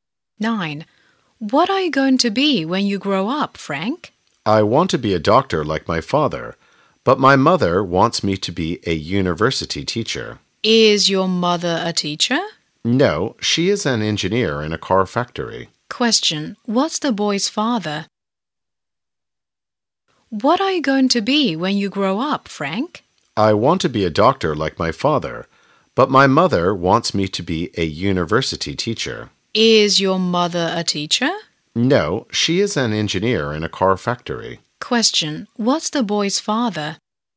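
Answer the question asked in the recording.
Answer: A doctor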